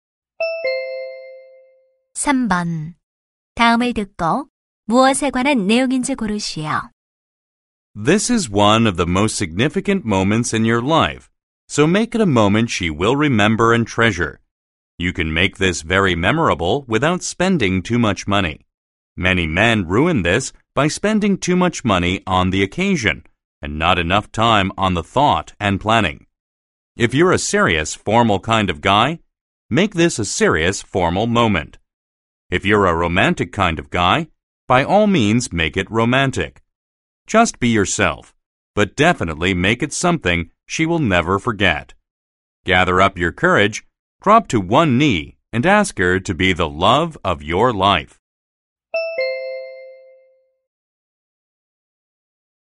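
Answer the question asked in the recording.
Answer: 청혼하는 방법에 대한 조언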